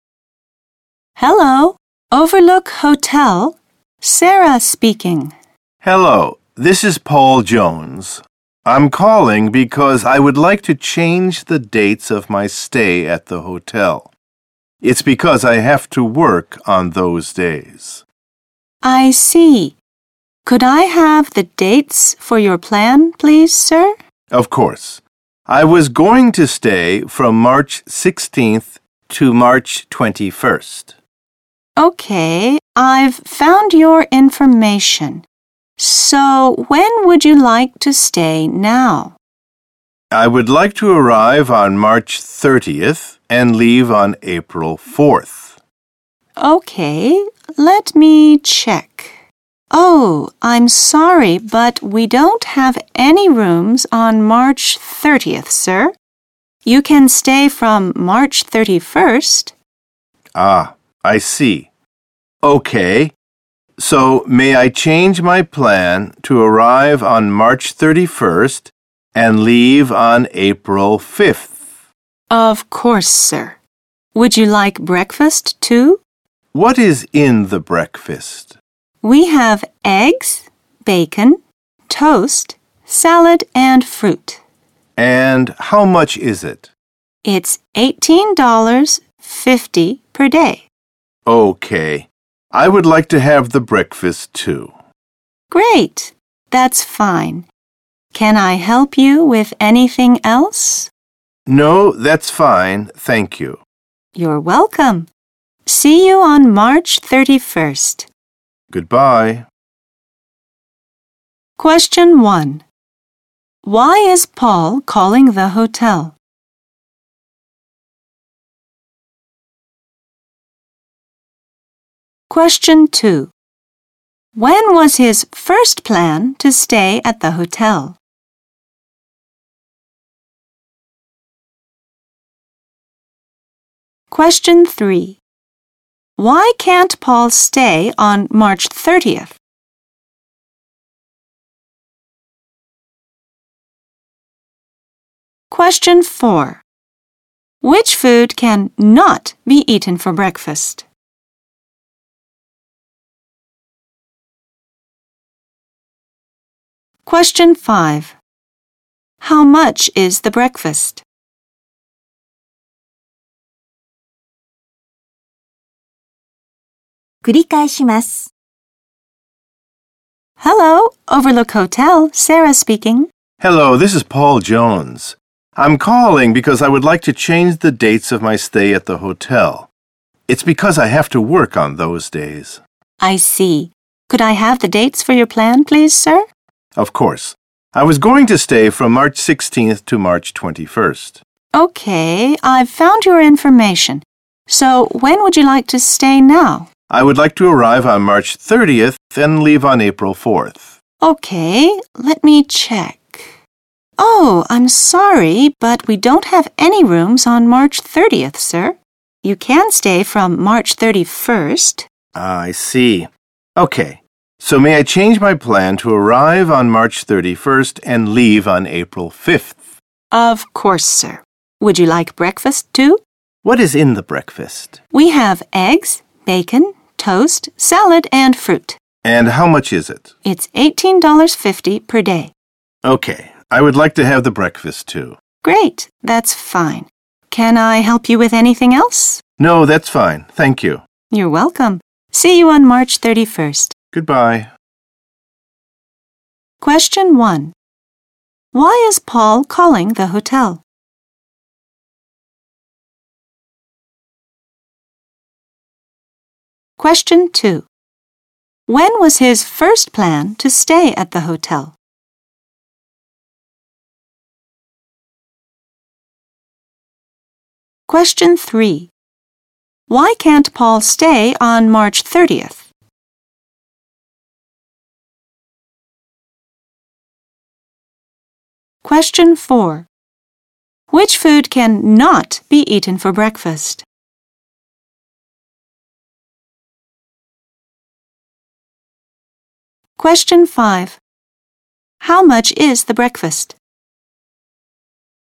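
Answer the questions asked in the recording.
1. He wants to change the dates of his stay because he has to work on those days.
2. From March 16th to March 21st
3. The hotel has no rooms on March 30th.
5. $18.50 per day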